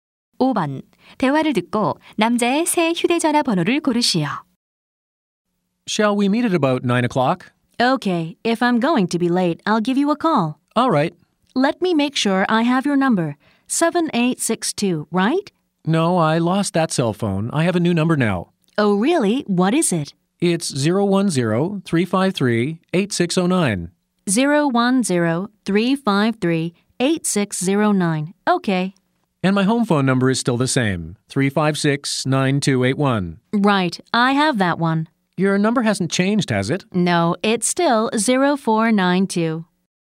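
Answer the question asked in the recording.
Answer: 010-353-8609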